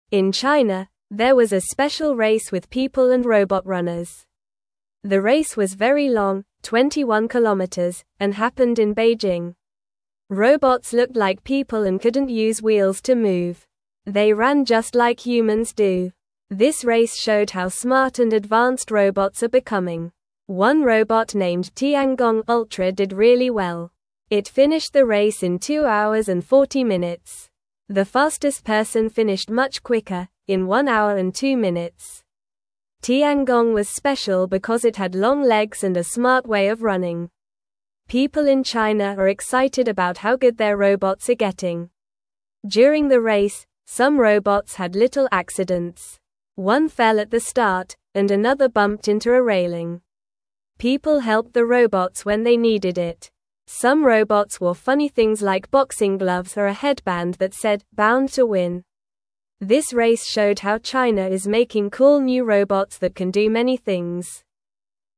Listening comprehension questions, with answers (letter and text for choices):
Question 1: Where did the robot race happen?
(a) Shanghai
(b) Hong Kong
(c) Beijing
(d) Guangzhou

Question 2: What did the robots look like?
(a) Cars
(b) Animals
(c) Trees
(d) People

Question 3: What is the name of one robot in the race?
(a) Speedy Robot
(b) Fast Runner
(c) Robot Racer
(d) Tiangong Ultra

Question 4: What did some robots wear during the race?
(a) Funny things like gloves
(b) Hats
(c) Shoes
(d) Dresses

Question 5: What happened to some robots during the race?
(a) They won the race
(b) They had little accidents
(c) They stopped running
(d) They flew away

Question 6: Why are people in China excited?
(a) They have new toys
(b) Their robots are getting better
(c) They are going on vacation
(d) They are making new friends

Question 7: In China, there was a special race with people and robot (1)______.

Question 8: Robots looked like people and couldn't use wheels to (2)______.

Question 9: This race showed how smart and advanced (3)______s are becoming.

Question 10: It finished the race in two (4)______s and 40 minutes.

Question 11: People in China are excited about how (5)______ their (6)______ are getting.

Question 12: People in China are excited about how (5)______ their (6)______ are getting.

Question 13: Some robots wore funny things like boxing (7)______ or a headband that said "Bound to Win."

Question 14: This (8)______ showed how China is making cool new robots that can do many things.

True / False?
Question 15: The robots walked like humans and did not use wheels.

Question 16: The race happened in Beijing.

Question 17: The slowest person finished the race in one hour and two minutes.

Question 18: Some robots wore funny things like boxing gloves.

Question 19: Some robots had little accidents during the race.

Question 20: One robot named Tiangong Ultra finished the race in two hours and 40 minutes.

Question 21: There was a parade in China with people and robots.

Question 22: The race was 20 kilometers long.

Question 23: Where did the special race happen?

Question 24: What is the name of the robot that ran in the race?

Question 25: What funny things did some robots wear during the race?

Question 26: What did people do when the robots had accidents?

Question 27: Why are people in China excited about robots?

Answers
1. (c) Beijing
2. (d) People
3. (d) Tiangong Ultra
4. (a) Funny things like gloves
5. (b) They had little accidents
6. (b) Their robots are getting better
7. runners
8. move
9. robot
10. hour
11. good
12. robots
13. gloves
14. race
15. False
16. True
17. False
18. True
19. True
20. True
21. False
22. False
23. The race happened in Beijing, China.
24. The robot's name is Tiangong Ultra.
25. Some robots wore boxing gloves and a headband that said "Bound to Win."
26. People helped the robots when they had accidents.
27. People in China are excited because their robots are getting better and smarter.

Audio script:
In China, there was a special race with people and robot runners. The race was very long, 21 kilometers, and happened in Beijing. Robots looked like people and couldn't use wheels to move. They ran just like humans do. This race showed how smart and advanced robots are becoming.
One robot named Tiangong Ultra did really well. It finished the race in two hours and 40 minutes. The fastest person finished much quicker, in one hour and two minutes. Tiangong was special because it had long legs and a smart way of running. People in China are excited about how good their robots are getting.
During the race, some robots had little accidents. One fell at the start, and another bumped into a railing. People helped the robots when they needed it. Some robots wore funny things like boxing gloves or a headband that said "Bound to Win." This race showed how China is making cool new robots that can do many things.

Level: Level 1